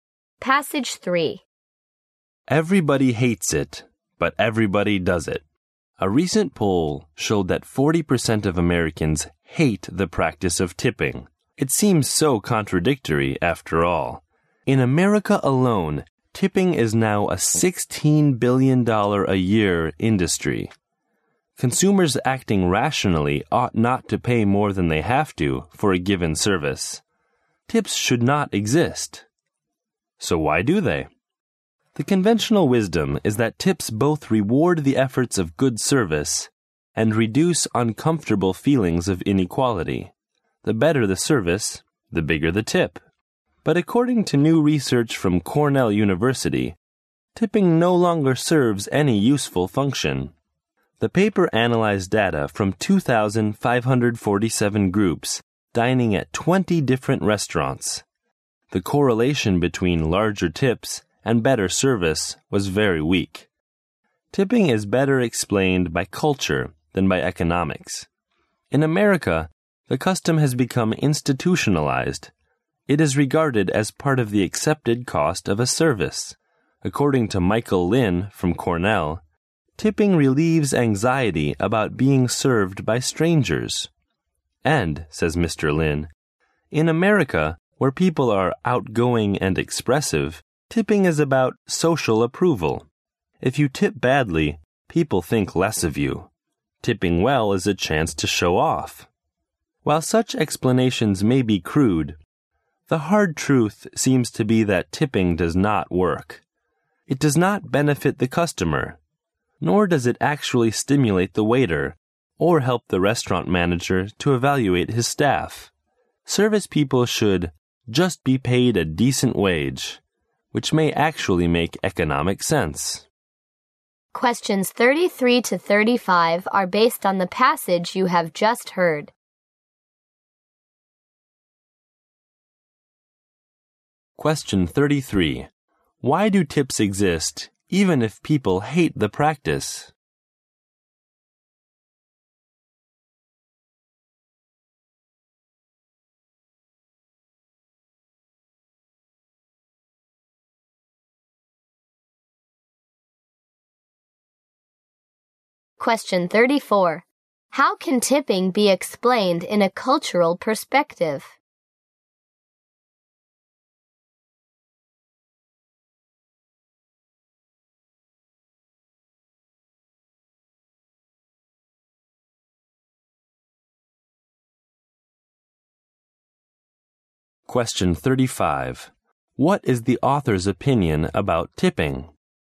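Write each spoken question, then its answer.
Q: How can tipping be explained in a cultural perspective?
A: It relieves anxiety and is about social approval

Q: What is the author's opinion about tipping?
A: Tipping doesn't work; service people should just be paid a decent wage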